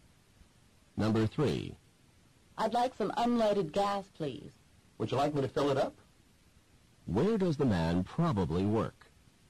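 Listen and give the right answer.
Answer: At a gas station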